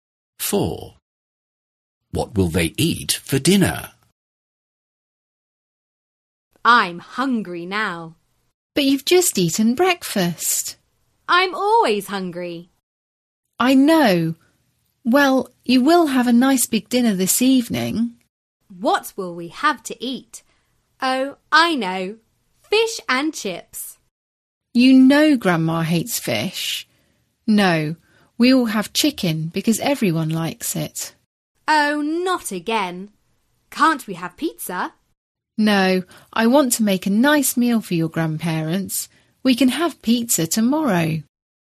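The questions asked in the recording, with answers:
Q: What will they eat for dinner?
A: Chicken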